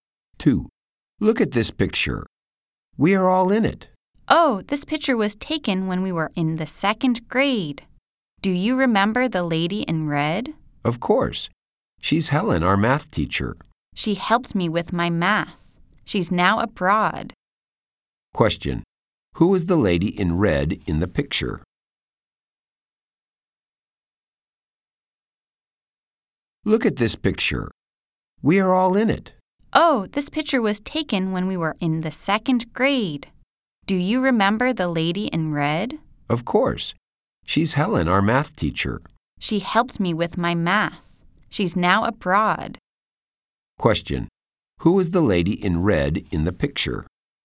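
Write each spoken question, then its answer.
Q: Who is the lady in red in the picture?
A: Helen, their math teacher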